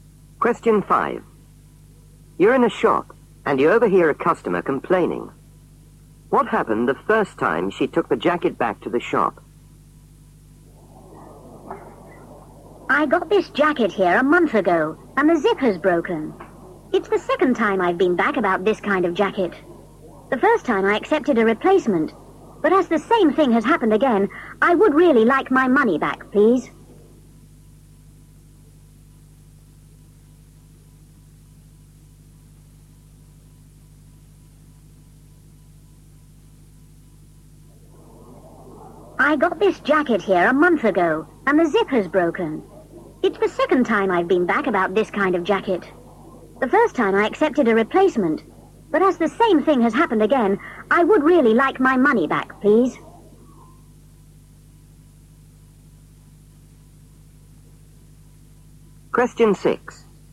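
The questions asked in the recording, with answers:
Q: What happened the first time she took the jacket back to the shop?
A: She accepted a replacement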